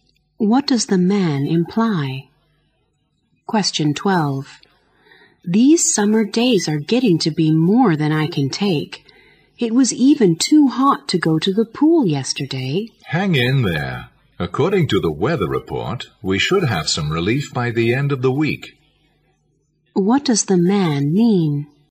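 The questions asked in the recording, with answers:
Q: What does the man mean?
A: The hot weather should end soon, by the end of the week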